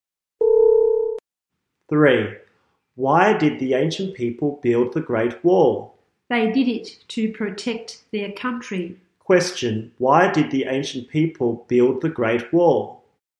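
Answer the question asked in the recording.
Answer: To protect their country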